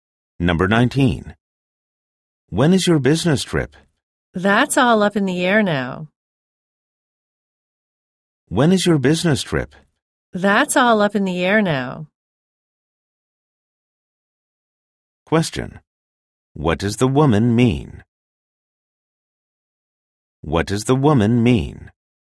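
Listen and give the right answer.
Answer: The trip's date is still undecided.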